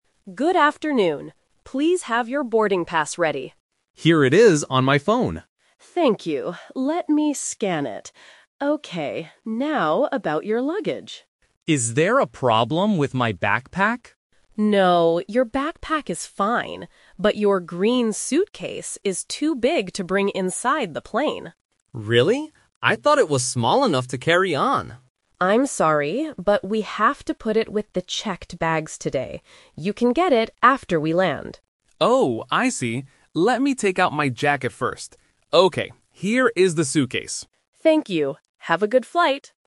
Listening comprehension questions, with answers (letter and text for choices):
Listen to the conversation between a gate agent and a passenger. Choose the correct answer (A, B, or C).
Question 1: How does the passenger show his boarding pass?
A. On his phone.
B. In his passport.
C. On a paper ticket.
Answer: A. On his phone.

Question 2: Which bag is too big for the plane?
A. The backpack.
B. The green suitcase.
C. The checked bag.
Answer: B. The green suitcase.

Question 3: What does the passenger take out of the suitcase?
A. His headphones.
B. His phone.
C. His jacket.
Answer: C. His jacket.

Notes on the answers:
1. The passenger clearly says, "Here it is on my phone." Options (B) and (C) are common ways to show a boarding pass, but they are not mentioned in the audio.
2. This question uses "The Twist". The passenger first asks about his "backpack" (Option A - The Trap), but the agent says it is fine. The agent then explains that his "green suitcase" is too big. Option (C) refers to where the bag will go, not the bag itself.
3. Before giving the suitcase to the agent, the passenger says, "Let me take out my jacket first." Option (B) is a trap because the phone was mentioned earlier for the boarding pass. Option (A) is a plausible item but is never mentioned.

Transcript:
Gate Agent: Good afternoon. Please have your boarding pass ready.
Passenger: Here it is on my phone.
Gate Agent: Thank you. Let me scan it... Okay. Now, about your luggage.
Passenger: Is there a problem with my backpack?
Gate Agent: No, your backpack is fine. But your green suitcase is too big to bring inside the plane.
Passenger: Really? I thought it was small enough to carry on.
Gate Agent: I'm sorry, but we have to put it with the checked bags today. You can get it after we land.
Passenger: Oh, I see. Let me take out my jacket first. Okay, here is the suitcase.